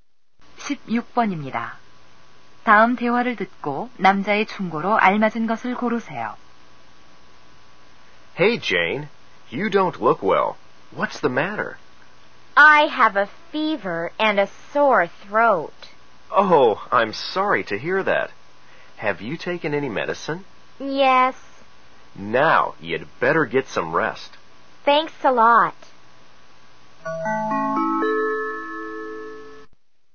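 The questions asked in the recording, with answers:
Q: 다음 대화를 듣고 남자의 충고로 알맞은 것을 고르세요.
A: 휴식을 취하라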